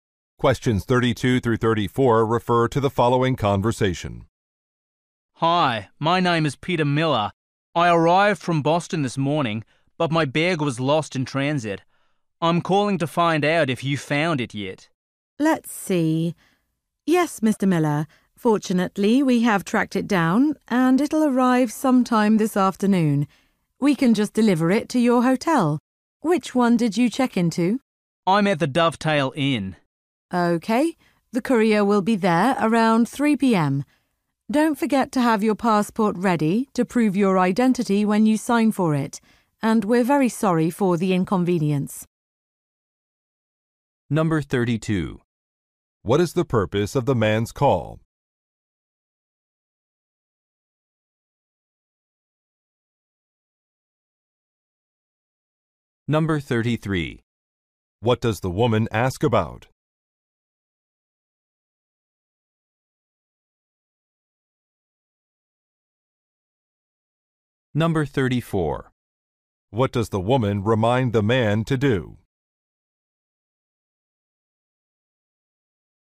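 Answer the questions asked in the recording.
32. To ask whether his lost bag has been found
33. Which hotel he checked into
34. Have his passport ready to prove his identity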